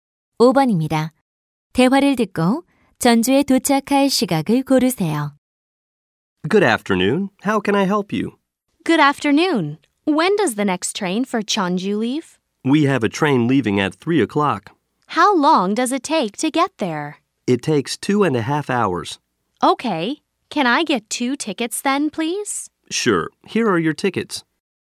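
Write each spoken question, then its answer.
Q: 대화를 듣고 전주에 도착할 시각을 고르세요.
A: 5시 30분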